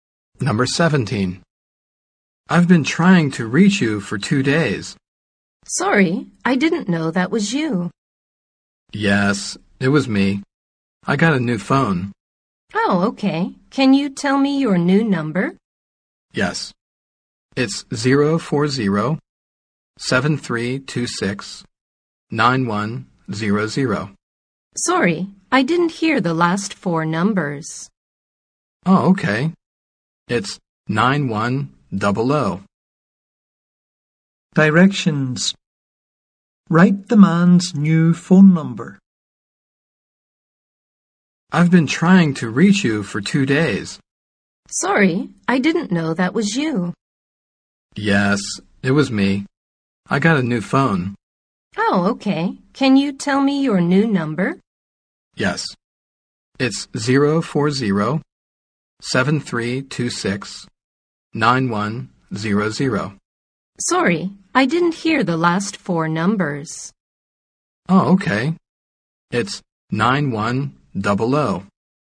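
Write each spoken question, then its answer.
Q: Directions. Write the man's new phone number.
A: 040-7326-9100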